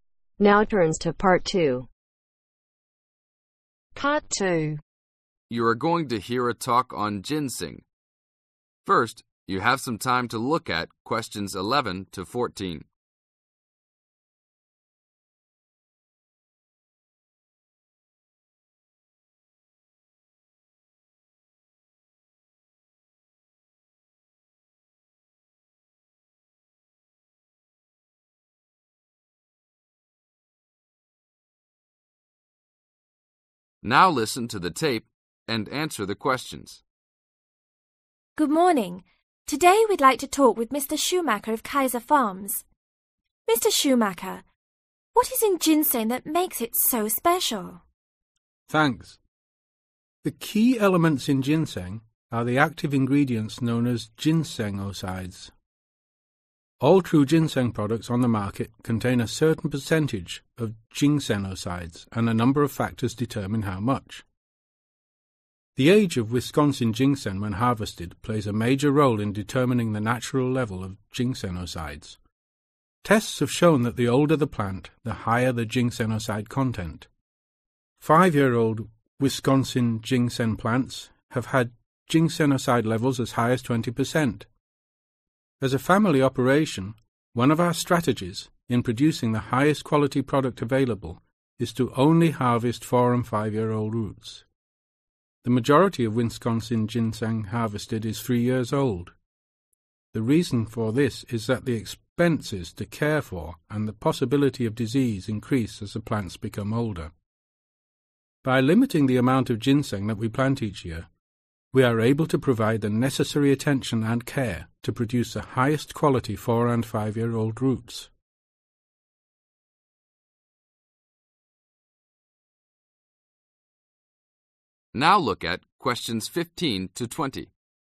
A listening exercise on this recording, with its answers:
Complete the notes as you listen. Write NO MORE THAN TWO WORDS for each answer.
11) Older ginseng plants have (11)............ levels of ginsenocide.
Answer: Higher

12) Harvest plants every (12)............ to ............ years.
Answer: Four to Five

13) Most (13)............ ginseng is harvested after three years in order to lower (14)............ and avoid disease.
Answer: Wisconsin

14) Most (13)............ ginseng is harvested after three years in order to lower (14)............ and avoid disease.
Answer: Expenses